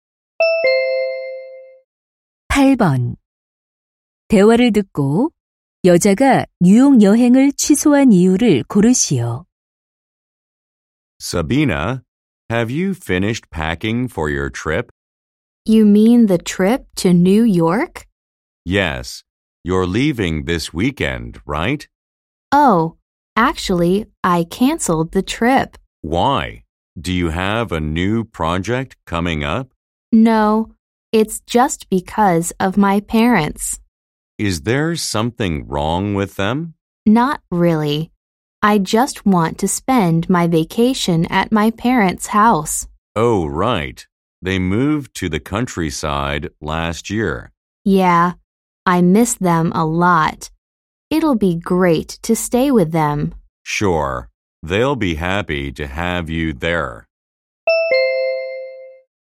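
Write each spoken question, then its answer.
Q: 대화를 듣고 여자가 뉴욕 여행을 취소한 이유를 고르시오.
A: 부모님 댁에서 휴가를 보내려고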